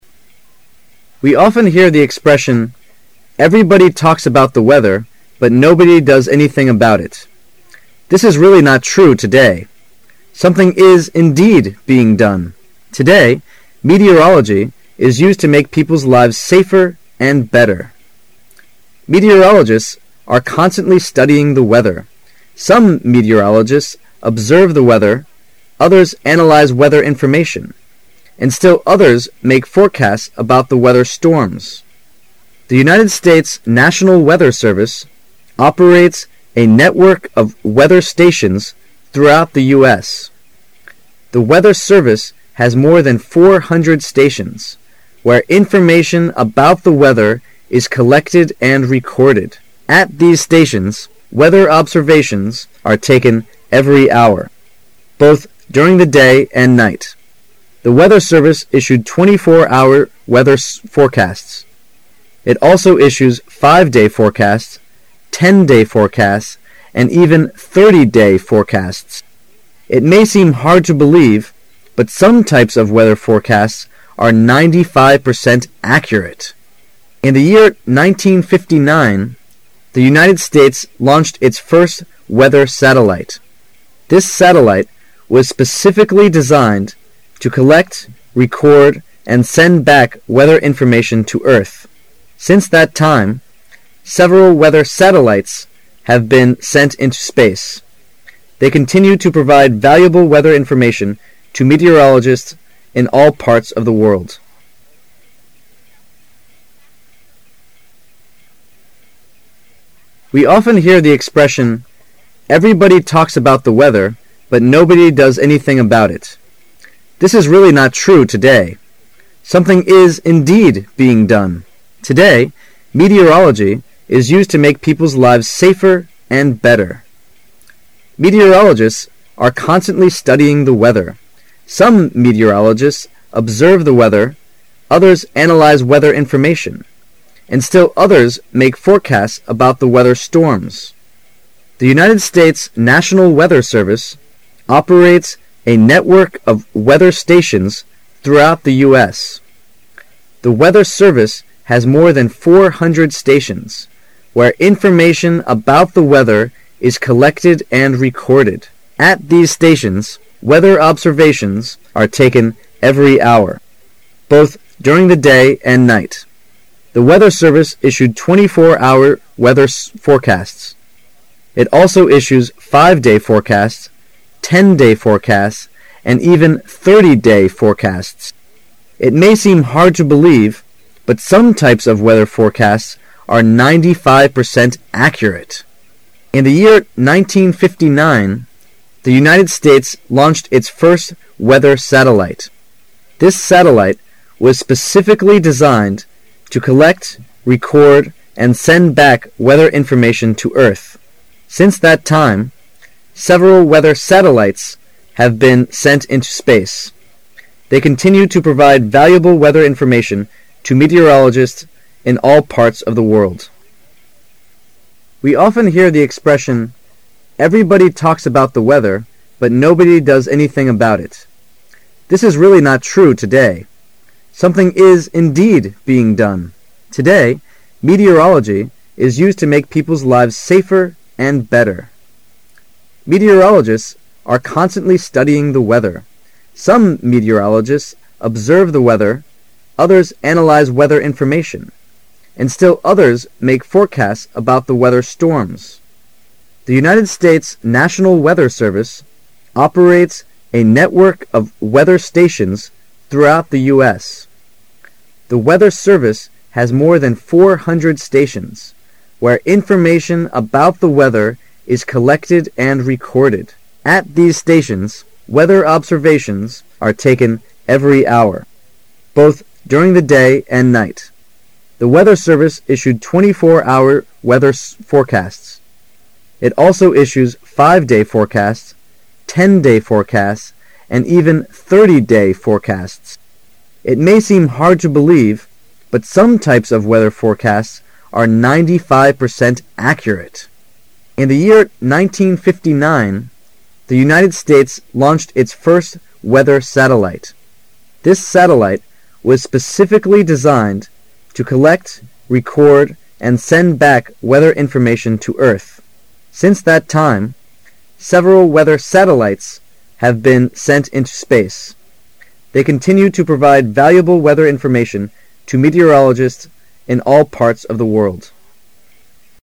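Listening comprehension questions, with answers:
Directions:In this section, you will hear a passage three times When the passage is read for the first time, you should listen careful for its general idea. Then listen to the passage again. When the passage is read for the second time, you are required to fill in the blanks numbered from 15 to 21 with the exact words you have just heard. For blanks numbered from 22 to 24 you are required to fill in the missing information. You can either use the exact words you have just heard or write down the main points in your own words. Finally, when the passage is read for the third time, you should check what you have just written.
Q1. We often hear the 1 , "Everybody talks about weather, but nobody does anything about it. "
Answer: expression

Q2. This is really not 2 today.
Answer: true

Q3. Something is, indeed, being 3 today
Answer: done

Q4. meteorology is used to make people's lives 4 and better.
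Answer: safer

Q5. Some meteorologists 5 the weather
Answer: observe

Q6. make forecasts about the weather 6 .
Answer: storms

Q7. The United States National Weather Service 7 a network of weather stations through the U.S.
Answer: operates

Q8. The Weather Service has more than 400 stations 8 .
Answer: where information about the weather is collected and recorded

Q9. It also issues 5 - day forecasts, 10 - day forecasts and even 30 - day forecasts. 9 .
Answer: It may seem hard to believe, but some types of weather forecasts are 95% accurate

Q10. send back weather information to earth. 10 .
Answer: Since that time, several weather satellites have been sent into space

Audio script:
[解析] 15-24 We often hear the (15)expression, "Everybody talks about weather, but nobody does anything about it. " This is really not (16)true today. Something is, indeed, being (17) done. Today, meteorology is used to make people's lives (18)saferand better. 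Meteorologists are constantly studying the weather. Some meteorologists (19)observe the weather, others analyze weather information, and still others make forecasts about the weather (20)storms. The United States National Weather Service (21)operates a network of weather stations through the U. S. The Weather Service has more than 400 stations (22) where in-formation about weather is collected and recorded. At these stations, weather observations are taken every hour, both during the day and night. The Weather Service issued 24 - hour weather forecasts. It also issues 5 - day forecasts, 10 - day forecasts and even 30 - day forecasts. (23) It may seem hard to believe, but some types of weather forecasts are 95% accurate. In the year 1959, the United States launched its first weather satellite. This satellite was specially designed to collect, record, and send back weather information to earth. 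(24) Since that time, several weather satellite have been ent into space. They continue to provide valuable weather information to meteorologist in all parts of the world.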